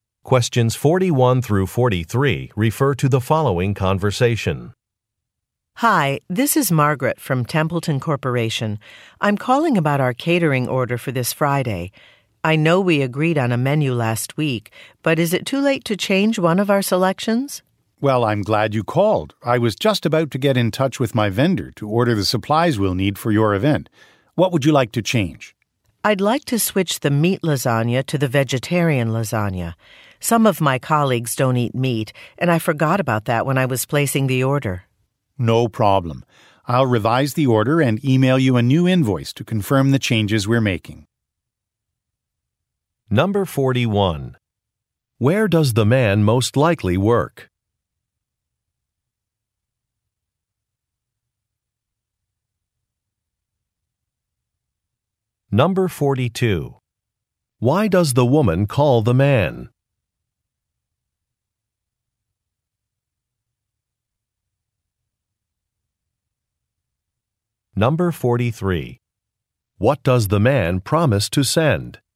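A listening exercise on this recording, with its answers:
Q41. Where does the man most likely work?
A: At a catering company

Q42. Why does the woman call the man?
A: To change an order

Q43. What does the man promise to send?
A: A confirmation e-mail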